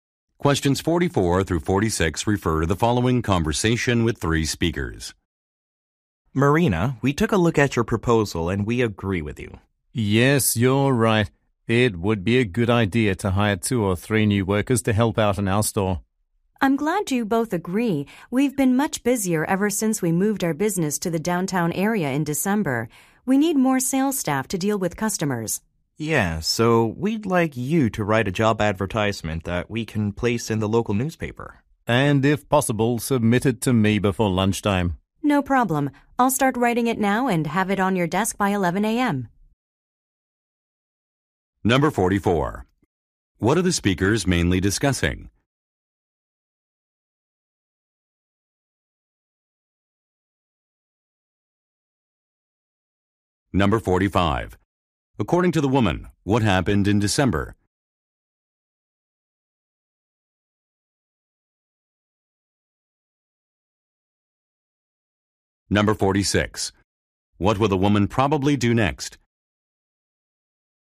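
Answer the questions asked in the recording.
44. Hiring new workers
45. The business moved downtown
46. Write a job advertisement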